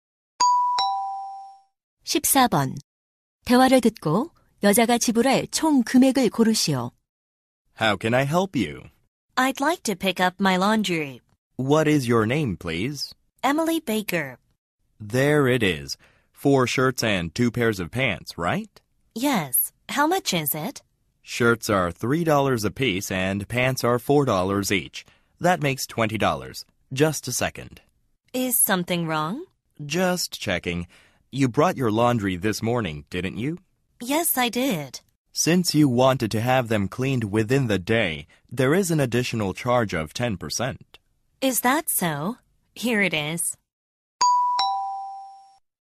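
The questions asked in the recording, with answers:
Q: 대화를 듣고 여자가 지불할 총 금액을 고르시오.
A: $22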